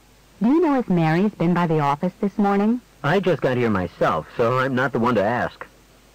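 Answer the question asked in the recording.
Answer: He doesn't know because he just arrived.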